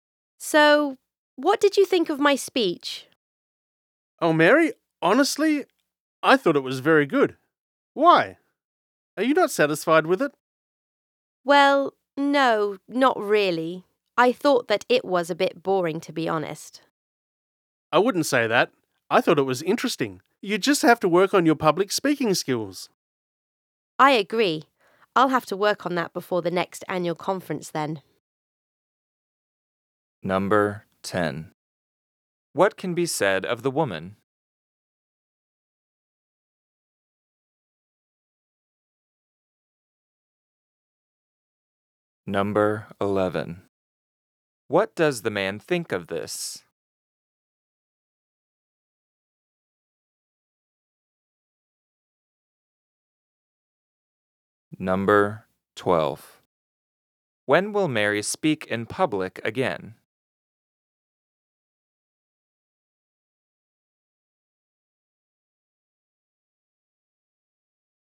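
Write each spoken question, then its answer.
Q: What can be said of the woman?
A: She gave a speech and isn't satisfied with it; she thinks it was a bit boring.

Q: What does the man think of this?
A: He thought the speech was good and interesting; she just needs to work on her public speaking skills.

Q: When will Mary speak in public again?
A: At the next annual conference.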